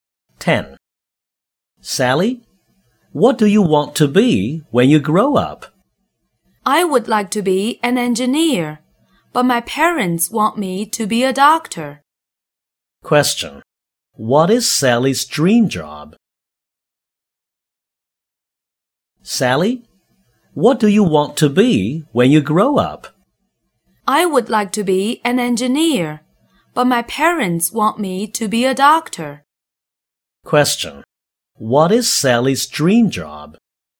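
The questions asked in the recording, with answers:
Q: What is Sally's dream job?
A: An engineer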